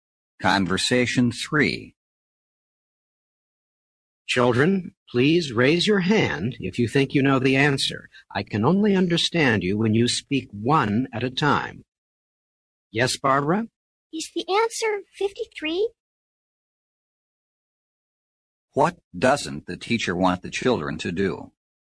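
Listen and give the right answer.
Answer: Speak all at the same time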